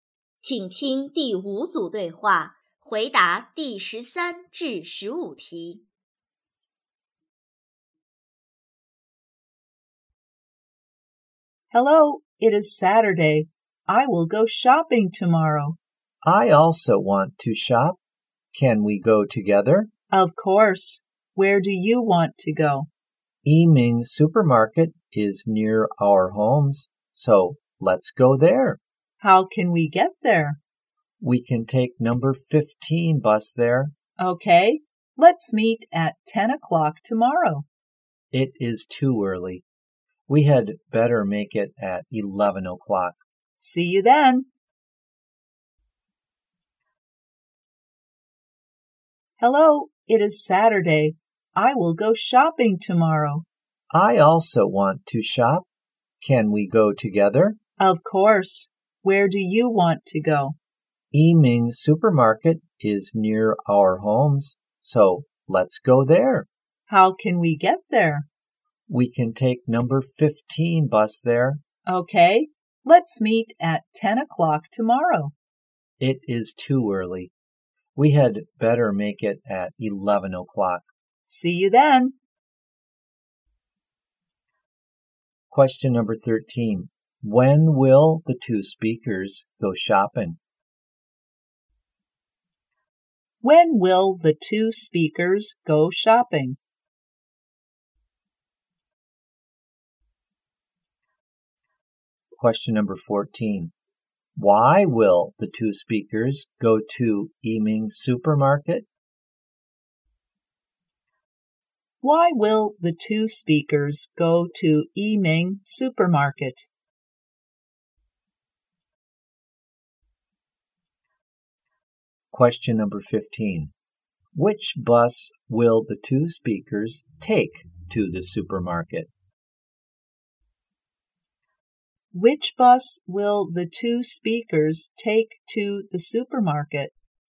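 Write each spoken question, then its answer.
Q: When will the two speakers go shopping?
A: Tomorrow (Sunday)

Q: Why will the two speakers go to Yiming Supermarket?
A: Because it is near their homes

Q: Which bus will the two speakers take to the supermarket?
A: Number 15 bus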